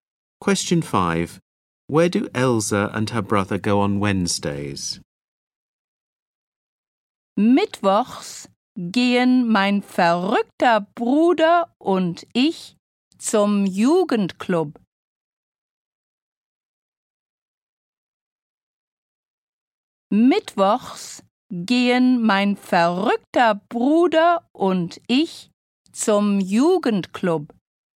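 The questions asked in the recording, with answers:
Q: Where do Elsa and her brother go on Wednesdays?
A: To the youth club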